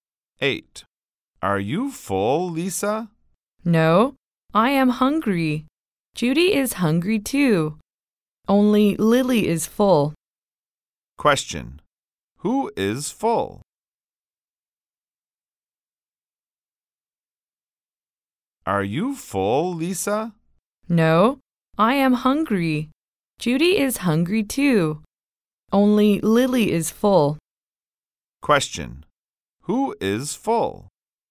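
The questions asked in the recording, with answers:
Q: Who is full?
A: Lily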